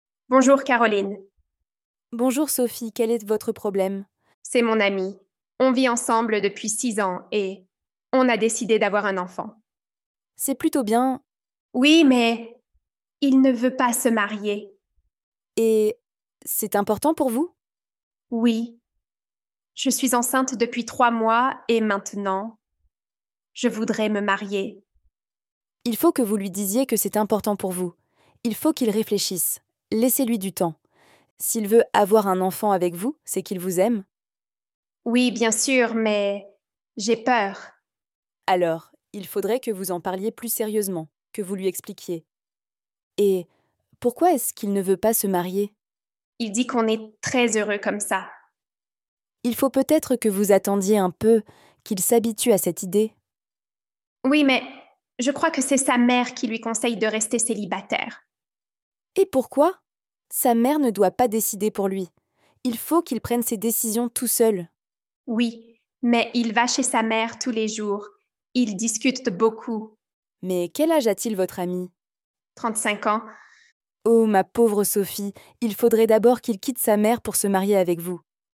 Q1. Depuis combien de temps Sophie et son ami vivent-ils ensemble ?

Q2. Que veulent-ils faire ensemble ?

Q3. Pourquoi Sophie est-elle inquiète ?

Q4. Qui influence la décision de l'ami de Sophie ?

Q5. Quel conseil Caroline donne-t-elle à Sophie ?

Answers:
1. Ils vivent ensemble depuis six ans.
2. Ils ont décidé d'avoir un enfant.
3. Parce que son ami ne veut pas se marier, alors qu'elle est enceinte.
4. Sa mère influence beaucoup sa décision.
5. Caroline conseille à Sophie de parler sérieusement avec son ami et de lui laisser du temps pour réfléchir.

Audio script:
Caroline : Bonjour Sophie, quel est votre problème ?
c'est mon ami ; on vit ensemble depuis six ans et... on a décidé d'avoir un enfant.
Caroline : C'est plutôt bien...
Sophie : Oui, mais... il ne veut pas se marier.
Caroline : Et... c'est important pour vous ?
Sophie : Oui. Je suis enceinte depuis trois mois et maintenant... je voudrais me marier.
Caroline : Il faut que vous lui disiez que c'est important pour vous. Il faut qu'il réfléchisse. Laissez-lui du temps. S'il veut avoir un enfant avec vous, c'est qu'il vous aime.
Sophie : Oui, bien sûr mais... j'ai peur.
Caroline : Alors, il faudrait que vous en parliez plus sérieusement, que vous lui expliquiez... Et... pourquoi est-ce qu'il ne veut pas se marier ?
Sophie : Il dit qu'on est très heureux comme ça.
Caroline : Il faut peut-être que vous attendiez un peu, qu'il s'habitue à cette idée.
Sophie : Oui, mais... je crois que c'est sa mère qui lui conseille de rester célibataire.
Caroline : Et pourquoi ? Sa mère ne doit pas décider pour lui. Il faut qu'il prenne ses décisions tout seul !
Sophie : Oui, mais il va chez sa mère tous les jours. Ils discutent beaucoup.
Caroline : Mais, quel âge a-t-il votre ami ?
Caroline : Oh, ma pauvre Sophie, il faudrait d'abord qu'il quitte sa mère pour se marier avec vous !

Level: Niveau : B1